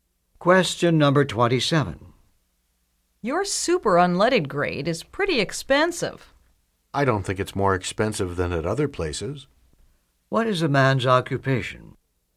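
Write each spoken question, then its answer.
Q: What is a man's occupation?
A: Gas station attendant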